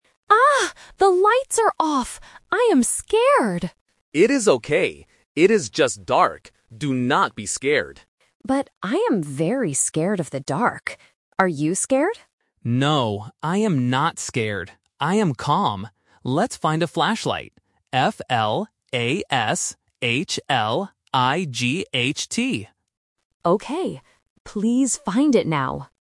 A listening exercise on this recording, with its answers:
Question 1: How does the girl feel?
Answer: Scared

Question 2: How does the boy feel?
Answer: Calm

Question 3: What does the boy want to find?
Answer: A flashlight

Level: A1